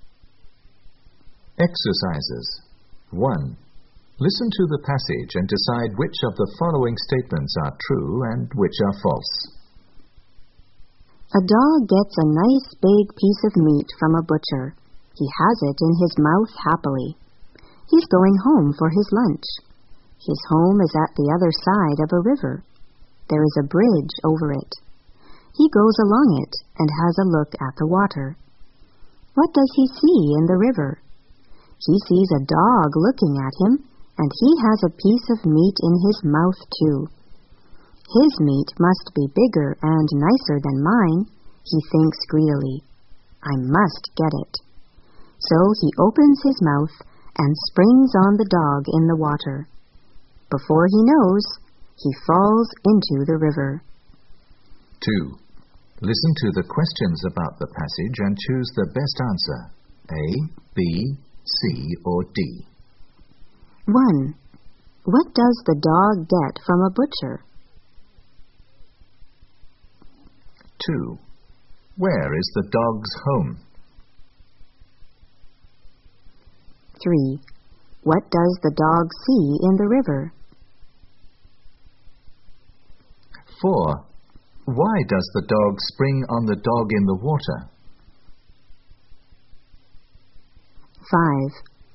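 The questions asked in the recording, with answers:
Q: What does the dog get from a butcher?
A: A nice big piece of meat

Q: Where is the dog's home?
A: At the other side of a river

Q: What does the dog see in the river?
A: A dog with a piece of meat in its mouth (its own reflection)

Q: Why does the dog spring on the dog in the water?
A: He thinks its meat is bigger and nicer and wants to get it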